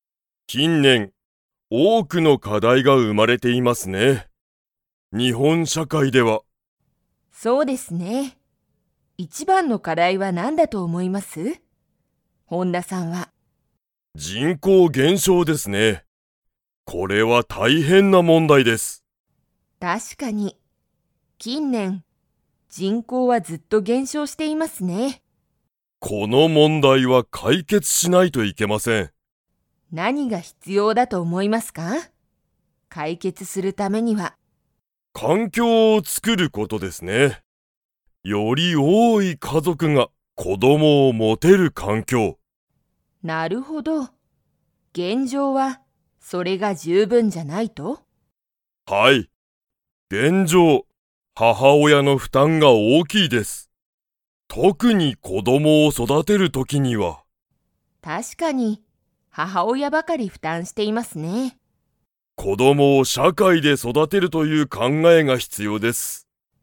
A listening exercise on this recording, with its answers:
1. 近年きんねん、日本にほんの人口じんこうはずっと減少げんしょうしていますか?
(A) はい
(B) いいえ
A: (A) はい

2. 現状げんじょう、特とくに子供こどもを育そだてる時とき、 の負担ふたんが大おおきい。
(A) 子供こども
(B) 社会しゃかい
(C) 父親ちちおや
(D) 母親ははおや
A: (D) 母親ははおや

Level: Level 4

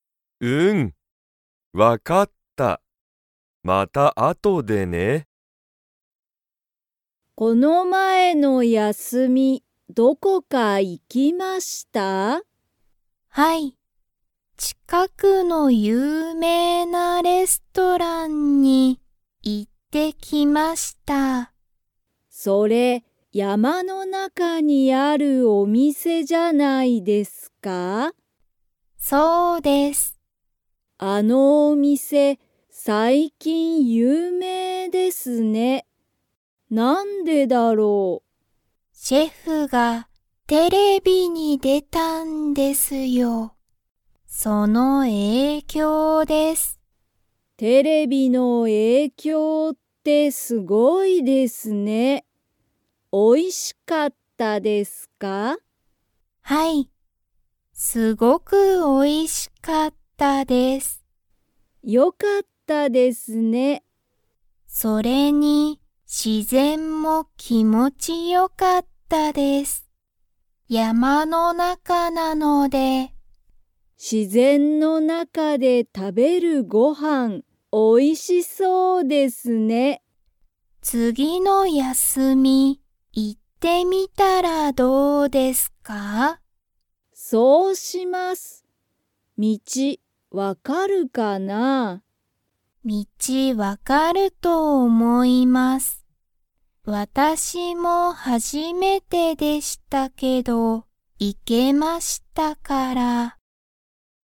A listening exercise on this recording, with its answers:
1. みずほは、この前(まえ)の休(やす)みにどこか行(い)きましたか?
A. はい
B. いいえ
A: A. はい

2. その店(みせ)のシェフは、____に出(で)た。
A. ラジオ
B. 海うみ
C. テレビ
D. 友達ともだち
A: C. テレビ

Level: Level 2

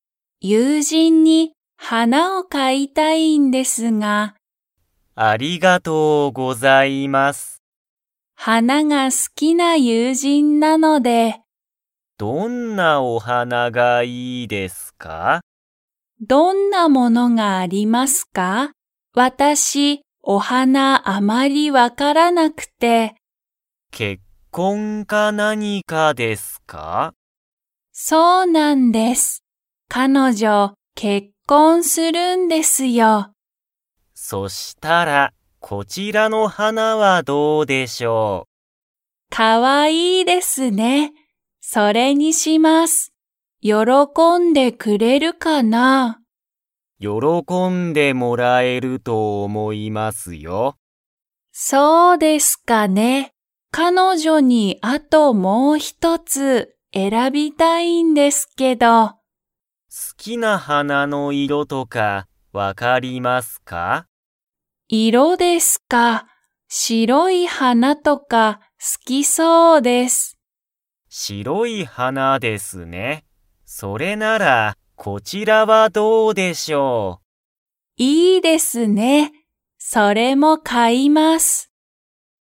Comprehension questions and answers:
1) サキの友人ゆうじんは、結婚けっこん 。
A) する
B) しない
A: A) する

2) サキの友人ゆうじんは、どんな花はなが好すきそうですか?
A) 怖こわい花はな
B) 白しろい花はな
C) 高たかい花はな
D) 赤あかい花はな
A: B) 白しろい花はな

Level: Level 3

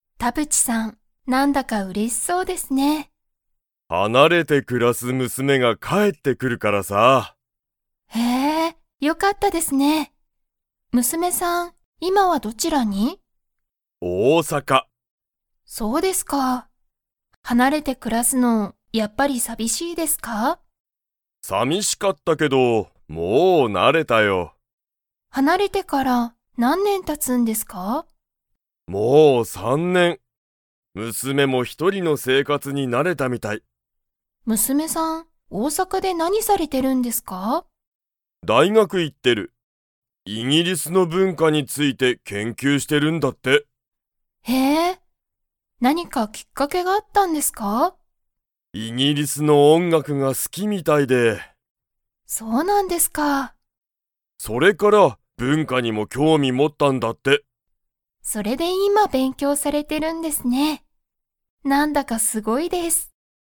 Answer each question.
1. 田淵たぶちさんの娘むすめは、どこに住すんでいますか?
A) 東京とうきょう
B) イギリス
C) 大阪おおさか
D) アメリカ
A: C) 大阪おおさか

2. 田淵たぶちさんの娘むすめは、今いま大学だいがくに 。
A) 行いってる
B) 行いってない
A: A) 行いってる

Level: Level 4

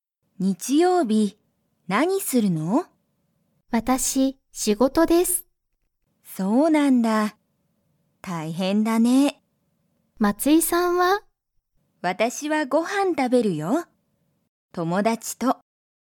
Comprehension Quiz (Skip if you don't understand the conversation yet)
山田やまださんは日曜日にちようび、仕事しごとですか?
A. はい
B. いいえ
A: A. はい

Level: Level 1

